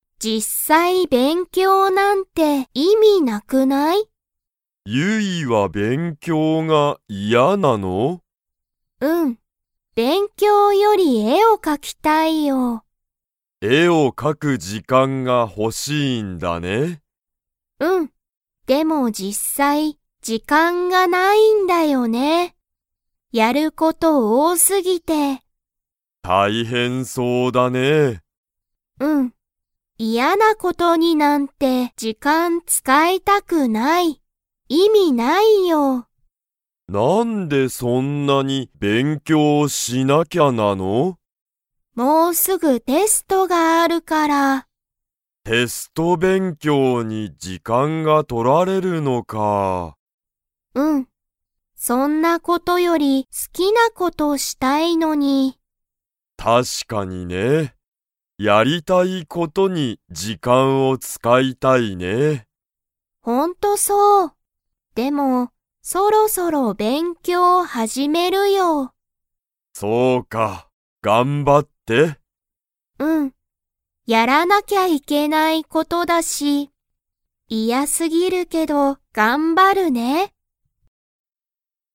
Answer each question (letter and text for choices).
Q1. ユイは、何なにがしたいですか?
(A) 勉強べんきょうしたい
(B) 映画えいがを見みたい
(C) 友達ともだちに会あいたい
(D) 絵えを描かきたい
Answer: (D) 絵えを描かきたい

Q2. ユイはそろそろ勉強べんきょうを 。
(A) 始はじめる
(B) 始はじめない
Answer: (A) 始はじめる

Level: Level 3